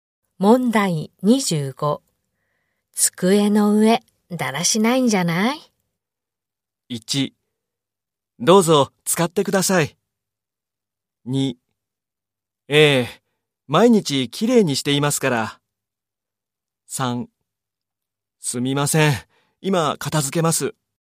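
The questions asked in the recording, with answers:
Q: 机の上、だらしないんじゃない?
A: 3: すみません。今片付けます。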